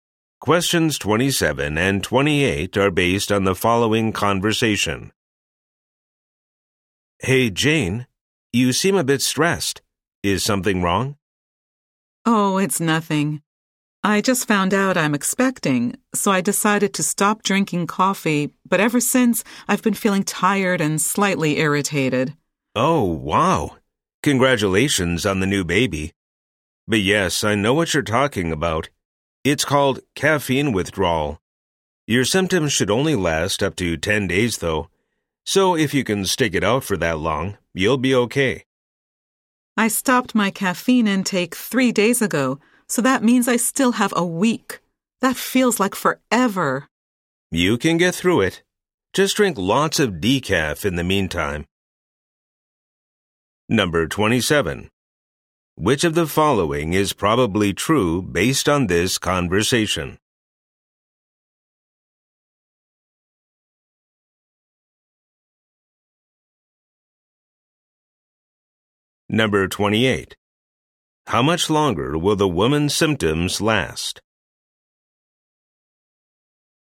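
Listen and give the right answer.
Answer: About a week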